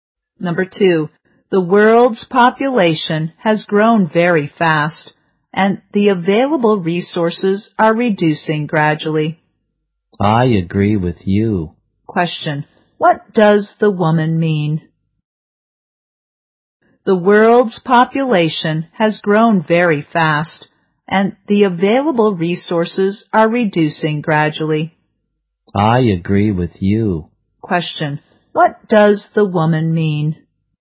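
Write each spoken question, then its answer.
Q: Question, what does the woman mean?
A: She agrees that the population has grown fast and resources are reducing.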